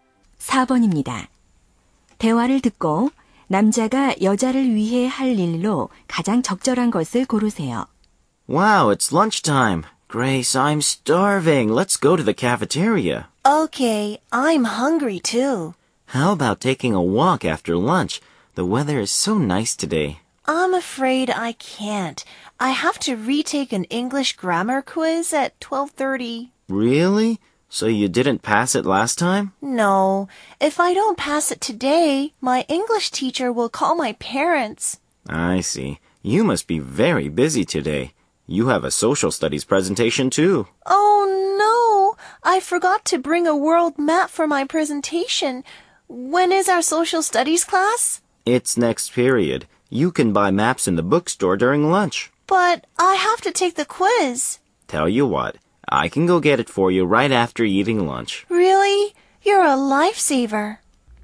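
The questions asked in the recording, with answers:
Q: 대화를 듣고 남자가 여자를 위해 할 일로 가장 적절한 것을 고르세요.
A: 서점에서 세계 지도 사 오기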